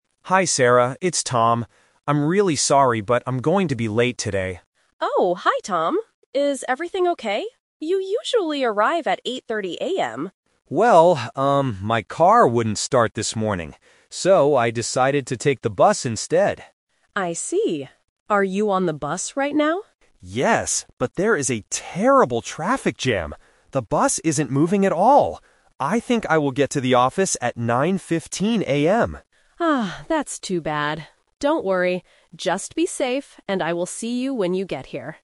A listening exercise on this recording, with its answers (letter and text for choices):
Listen to the conversation and choose the correct answer (A, B, or C).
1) What time does Tom usually arrive at work?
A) 8:00 AM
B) 8:30 AM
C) 9:15 AM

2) How is Tom traveling to work today?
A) By car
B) By train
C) By bus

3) Why is Tom going to be late?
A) He woke up too late.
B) There is a bad traffic jam.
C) He missed his bus.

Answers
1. B) 8:30 AM
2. C) By bus
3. B) There is a bad traffic jam.

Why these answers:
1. Sarah says, "You usually arrive at 8:30 AM." Option C (9:15 AM) is a trap because it is the time Tom thinks he will arrive today, not his usual time. Option A is not mentioned.
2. Tom says, "So, I decided to take the bus instead." Option A (By car) is a trap because he wanted to drive, but his car wouldn't start. Option B is not mentioned.
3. Tom explicitly says, "there is a terrible traffic jam. The bus isn't moving at all." Option A is not mentioned. Option C is a trap because he didn't miss the bus; he is currently on the bus.

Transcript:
Tom: Hi Sarah. It's Tom. I'm really sorry, but I'm going to be late today.
Sarah: Oh, hi Tom. Is everything okay? You usually arrive at 8:30 AM.
Tom: Well, um, my car wouldn't start this morning. So, I decided to take the bus instead.
Sarah: I see. Are you on the bus right now?
Tom: Yes, but there is a terrible traffic jam. The bus isn't moving at all! I think I will get to the office at 9:15 AM.
Sarah: Ah, that's too bad. Don't worry. Just be safe, and I will see you when you get here.